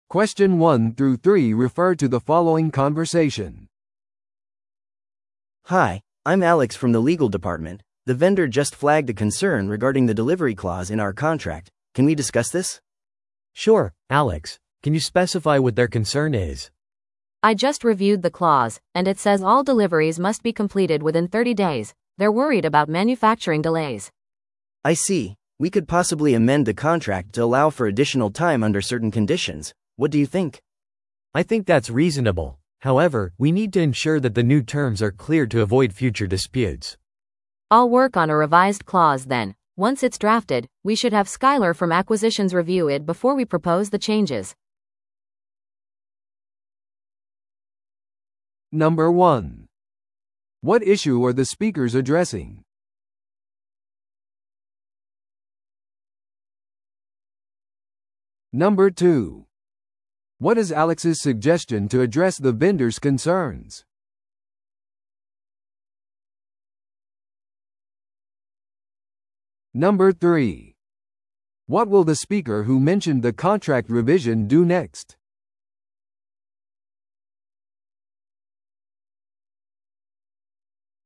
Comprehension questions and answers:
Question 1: What issue are the speakers addressing?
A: 配送条項に関する懸念

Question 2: What is Alex's suggestion to address the vendor's concerns?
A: 納期の延長を容認するよう配送条項を修正する

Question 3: What will the speaker who mentioned the contract revision do next?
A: 契約の修正条項に取り組む

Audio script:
A: Hi, I'm Alex from the legal department. The vendor just flagged a concern regarding the delivery clause in our contract. Can we discuss this?
B: Sure, Alex. Can you specify what their concern is?
C: I just reviewed the clause, and it says all deliveries must be completed within 30 days. They're worried about manufacturing delays.
A: I see. We could possibly amend the contract to allow for additional time under certain conditions. What do you think?
B: I think that's reasonable. However, we need to ensure that the new terms are clear to avoid future disputes.
C: I'll work on a revised clause then. Once it's drafted, we should have Skyler from acquisitions review it before we propose the changes.